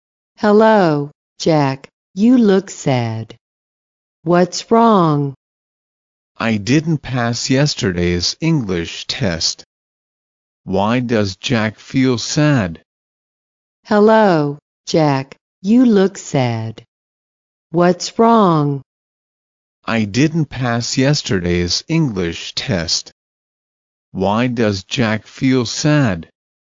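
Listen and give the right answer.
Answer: He didn't pass yesterday's English test.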